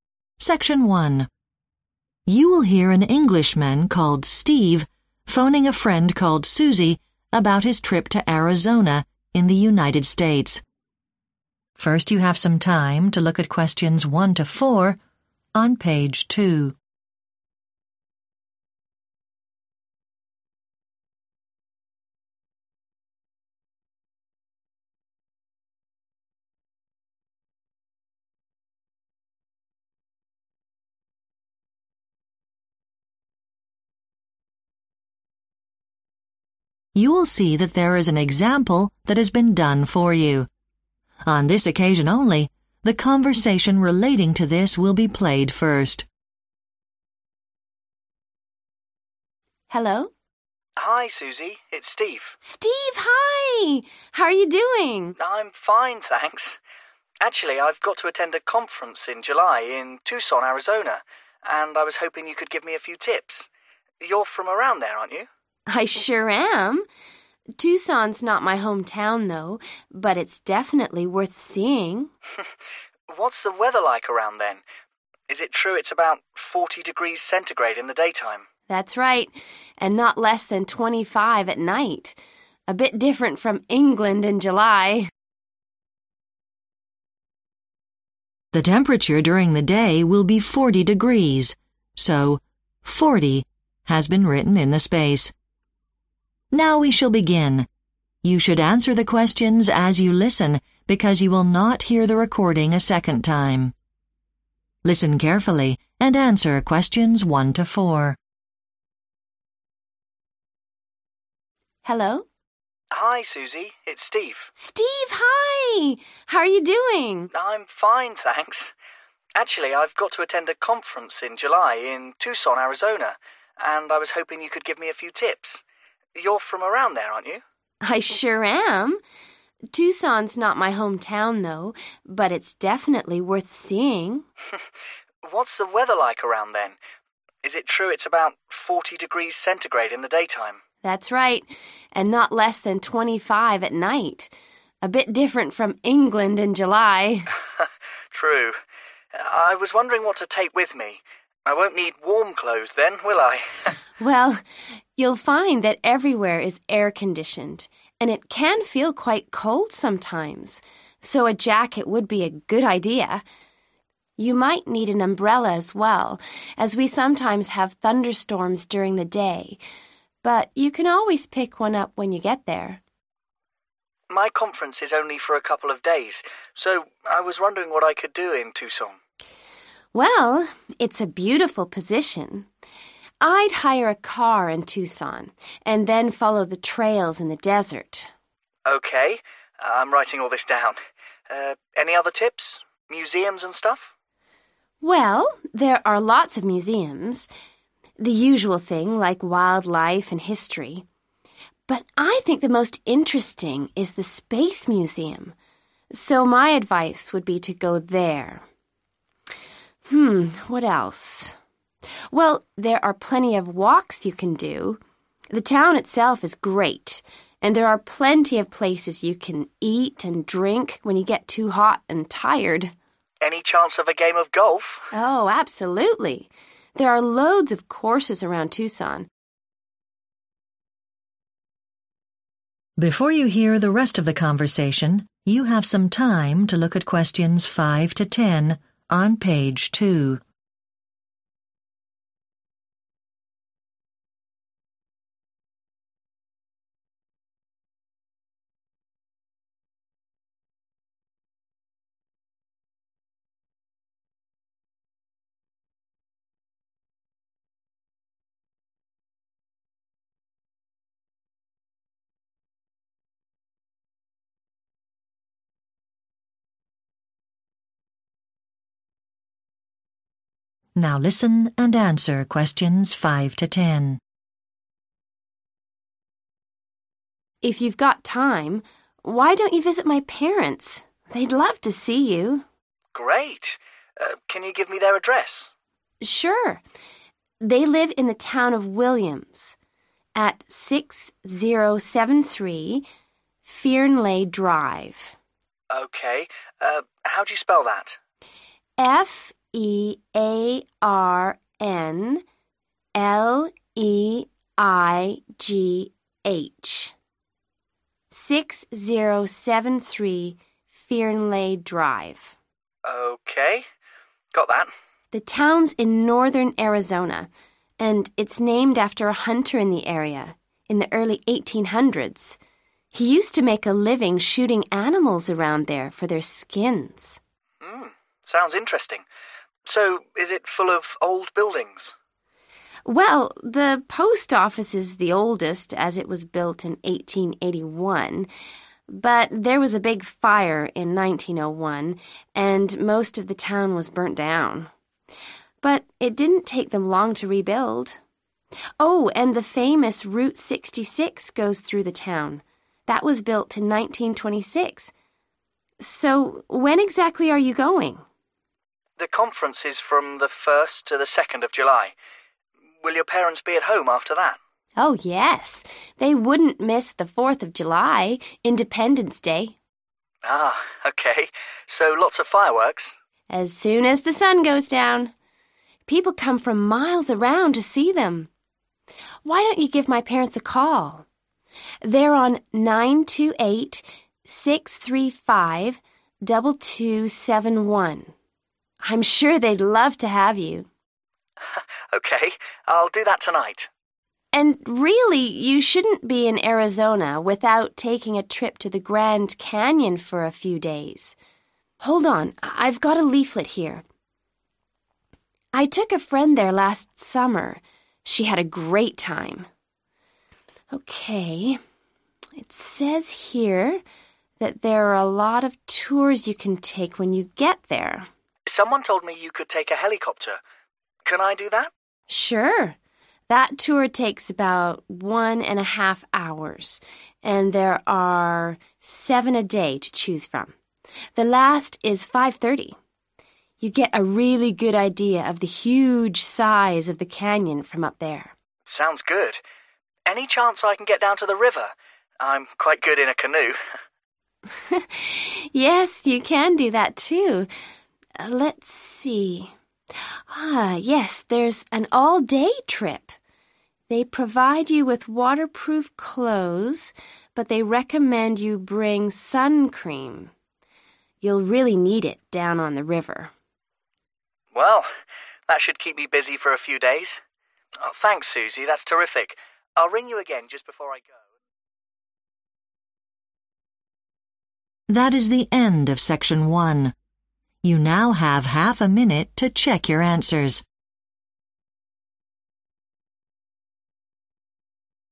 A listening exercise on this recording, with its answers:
Complete the notes below. Write NO MORE THAN TWO WORDS AND/OR A NUMBER for each answer.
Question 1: pack a __________ (1)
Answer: jacket

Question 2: drive from Tucson along the __________ (2) trails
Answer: desert

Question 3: go to the __________ (3) (highly recommended)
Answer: space museum

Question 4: there is the possibility of playing __________ (4)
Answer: golf

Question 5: Address: 6073 __________ (5) Drive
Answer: Fearnleigh

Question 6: destroyed by fire in __________ (6) (rebuilt later)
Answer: 1901

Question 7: 4th July – Independence Day: there will be __________ (7) in the evening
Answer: fireworks

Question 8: Susie's parents' phone number: __________ (8)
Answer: 928-635-2271

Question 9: tour by __________ (9) (11⁄2 hrs; 7 trips a day)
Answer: helicopter

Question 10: canoe (all day; important to take __________ (10))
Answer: sun cream